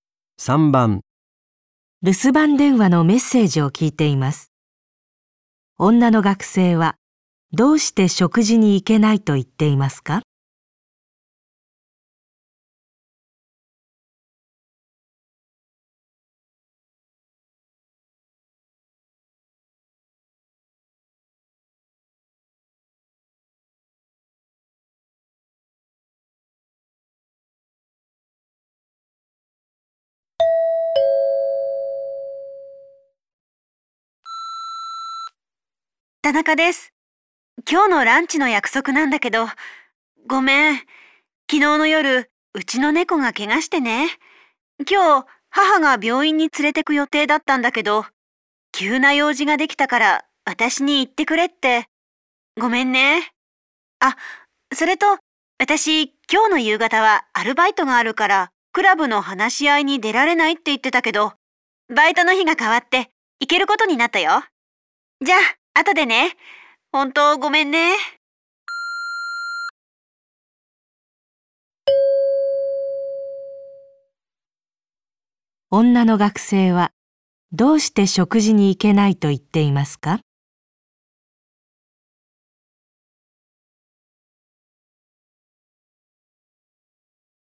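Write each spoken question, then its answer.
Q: 女の学生はどうして食事に行けないと言っていますか?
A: 怪我をした猫を病院に連れて行かなければならないから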